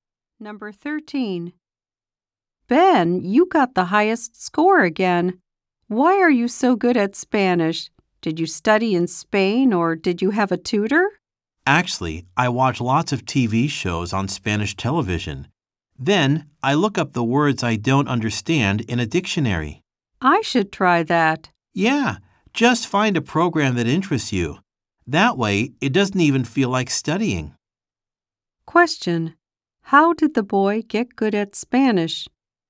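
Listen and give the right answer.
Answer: By watching Spanish TV shows and looking up words in a dictionary.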